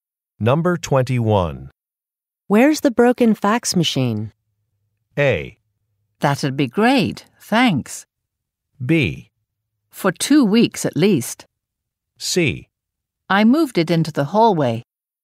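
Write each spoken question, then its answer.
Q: Where's the broken fax machine?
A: C: I moved it into the hallway.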